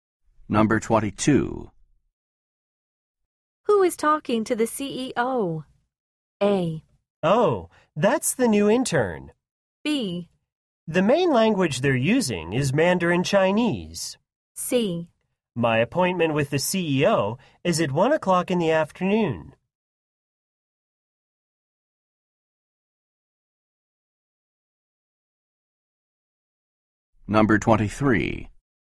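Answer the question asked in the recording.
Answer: A: Oh, that's the new intern.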